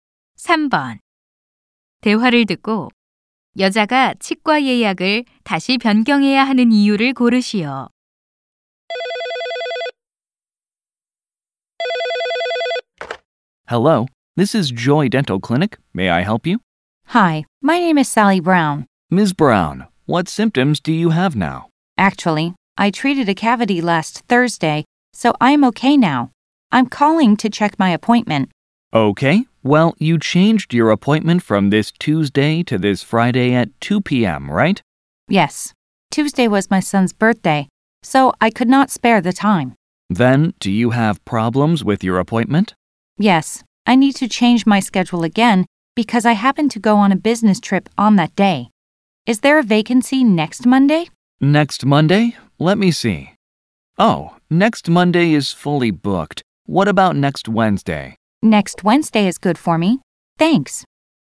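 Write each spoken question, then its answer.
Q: 대화를 듣고 여자가 치과 예약을 다시 변경해야 하는 이유를 고르시오.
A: 그날 출장을 가게 되어서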